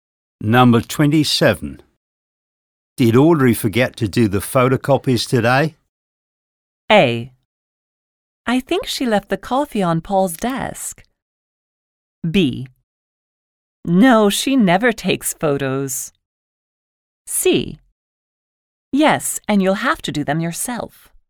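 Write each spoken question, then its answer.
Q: Did Audrey forget to do the photocopies today?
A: C: Yes, and you'll have to do them yourself.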